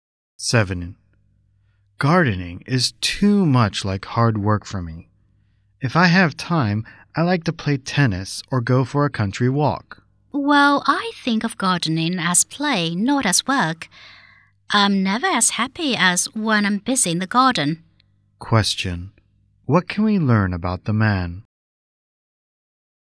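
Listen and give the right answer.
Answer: He doesn't like gardening; he prefers tennis or country walks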